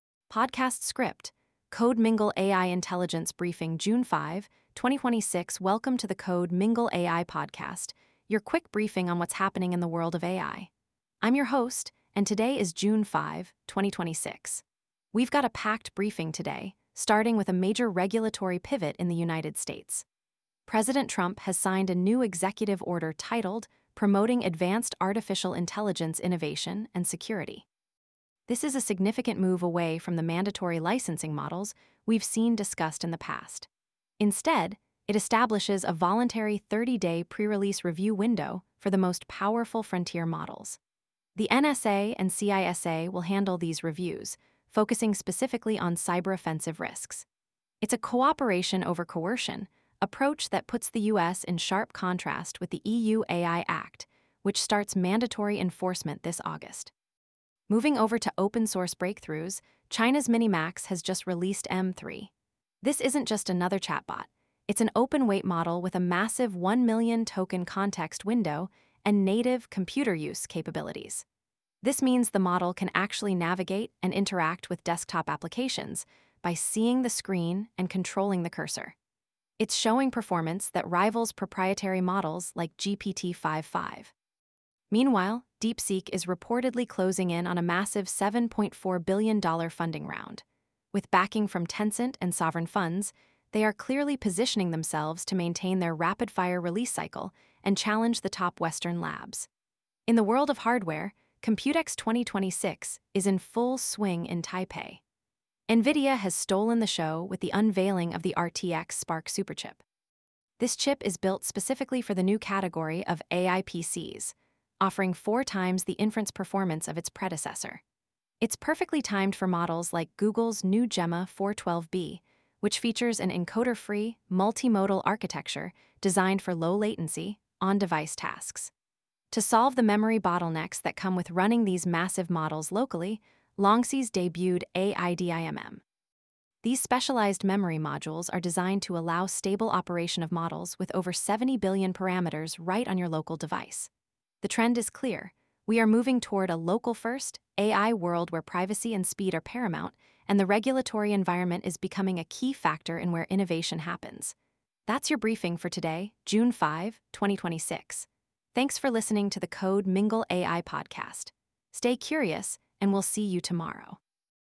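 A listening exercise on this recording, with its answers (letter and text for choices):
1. What is the primary focus of the new U.S. AI Executive Order signed in June 2026?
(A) Mandatory licensing for all AI developers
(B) A voluntary 30-day pre-release review window for frontier models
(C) A total ban on open-source frontier models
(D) Nationalization of compute clusters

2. Which model recently introduced a 1-million-token context window with native 'computer use' capabilities?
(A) GPT-5.5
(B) Gemini 3.1 Pro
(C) MiniMax M3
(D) Llama 4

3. What is unique about the Google Gemma 4 12B architecture?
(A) It uses a separate encoder for every language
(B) It is an encoder-free multimodal model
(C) It requires a minimum of 256GB of VRAM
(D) It only supports text-to-speech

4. At which event was the NVIDIA RTX Spark Superchip unveiled?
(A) CES 2026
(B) GTC 2026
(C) Computex 2026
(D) Web Summit 2026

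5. What is the purpose of Longsys AIDIMMTM memory?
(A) To increase cloud storage capacity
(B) To allow stable 70B+ parameter LLM operation on local edge devices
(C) To replace the GPU entirely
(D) To encrypt AI model weights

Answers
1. (B) A voluntary 30-day pre-release review window for frontier models
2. (C) MiniMax M3
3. (B) It is an encoder-free multimodal model
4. (C) Computex 2026
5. (B) To allow stable 70B+ parameter LLM operation on local edge devices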